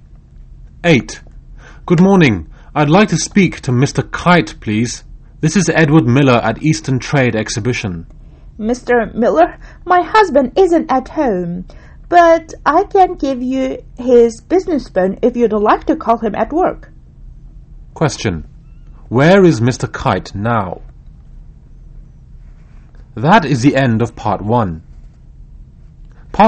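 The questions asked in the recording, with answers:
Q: Where is Mr. Kite now?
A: At work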